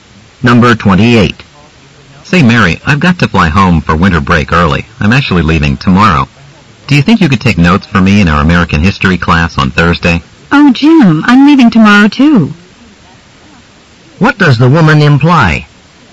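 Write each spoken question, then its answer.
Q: What does the woman imply?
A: She can't take notes for him because she is leaving too.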